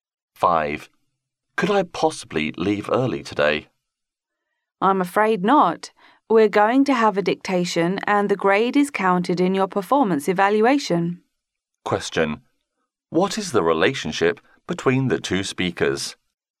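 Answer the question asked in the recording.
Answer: Student and teacher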